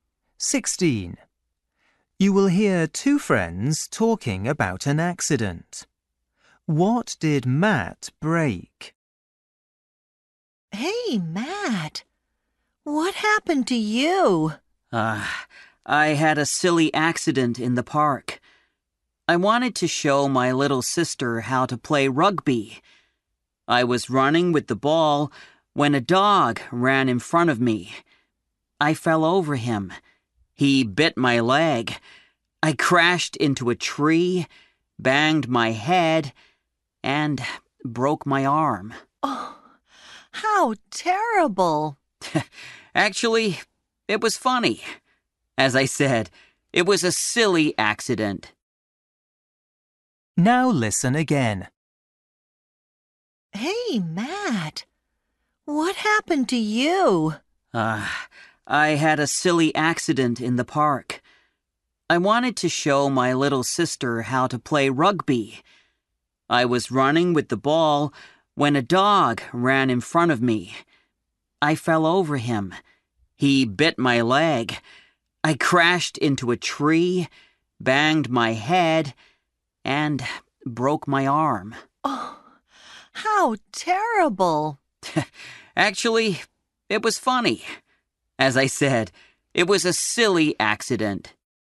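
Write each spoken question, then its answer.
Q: What did Matt break?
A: his arm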